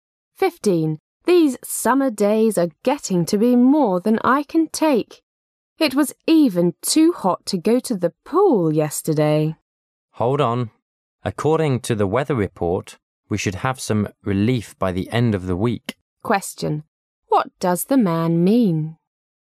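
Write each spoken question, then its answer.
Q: What does the man mean?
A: The weather should cool down by the end of the week

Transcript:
[解析] W: These summer days are getting to be more than I can take. It was even too hot to go to the pool yesterday. M: Hold on; according to the weather report we should have some relief by the end of the week. Q: What does the man mean?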